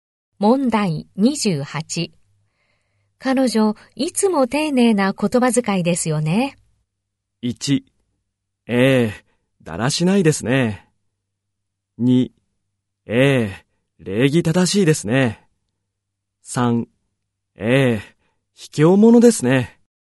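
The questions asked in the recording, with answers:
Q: 彼女、いつも丁寧な言葉遣いですよね。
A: 2: ええ、礼儀正しいですね。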